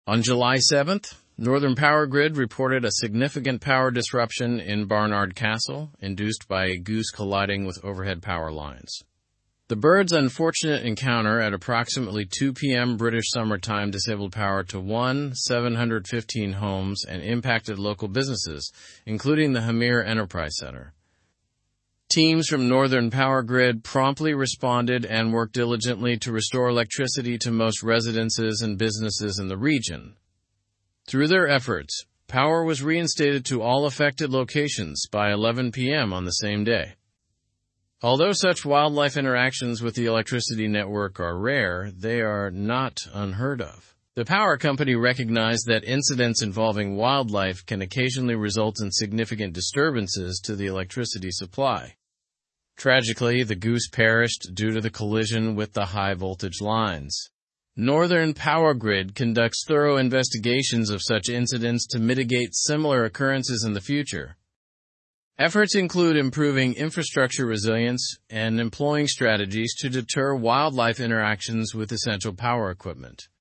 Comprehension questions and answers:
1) What caused the power disruption in Barnard Castle?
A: A goose colliding with the power lines caused the power disruption in Barnard Castle.

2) How many homes were affected by the power disruption?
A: The power disruption affected 1,715 homes.

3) Which local business was mentioned as being impacted by the power outage?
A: The Hamire Enterprise Centre was impacted by the power outage.

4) By when was electricity restored to all affected locations?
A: Electricity was restored to all affected locations by 11:00 PM on the same day.

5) What does Northern Powergrid do to prevent future incidents like this?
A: Northern Powergrid conducts investigations and enhances infrastructure resilience to prevent future incidents.

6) How common are wildlife-related disruptions to the power supply?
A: Wildlife-related disruptions to the power supply are rare but not unheard of.

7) What happened to the goose involved in the incident?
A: The goose involved in the incident perished.

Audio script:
On July 7, Northern Powergrid reported a significant power disruption in Barnard Castle, induced by a goose colliding with overhead power lines. The bird's unfortunate encounter at approximately 2:00 PM BST disabled power to 1,715 homes and impacted local businesses, including the Hamire Enterprise Centre.
Teams from Northern Powergrid promptly responded and worked diligently to restore electricity to most residences and businesses in the region. Through their efforts, power was reinstated to all affected locations by 11:00 PM on the same day.
Although such wildlife interactions with the electricity network are rare, they are not unheard of. The power company recognized that incidents involving wildlife can occasionally result in significant disturbances to the electricity supply.
Tragically, the goose perished due to the collision with the high-voltage lines. Northern Powergrid conducts thorough investigations of such incidents to mitigate similar occurrences in the future.
Efforts include improving infrastructure resilience and employing strategies to deter wildlife interactions with essential power equipment.

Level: Level 4